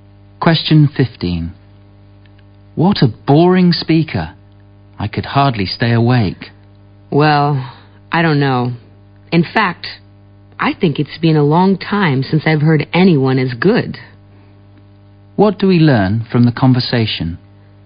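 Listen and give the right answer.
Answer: The speakers disagree: the man thought the speaker was very good.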